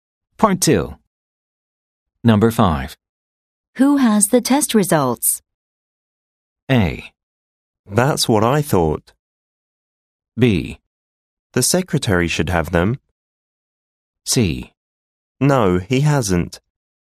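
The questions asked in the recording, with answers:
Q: Who has the test results?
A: B: The secretary should have them.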